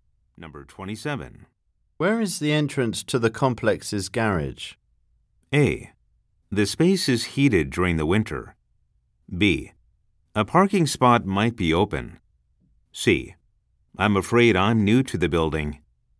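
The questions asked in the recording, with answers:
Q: Where is the entrance to the complex's garage?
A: C: I'm afraid I'm new to the building.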